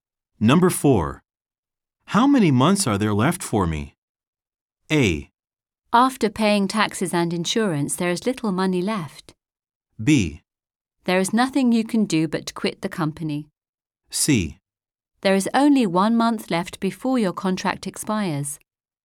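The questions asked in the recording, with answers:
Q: How many months are there left for me?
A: C: There is only 1 month left before your contract expires.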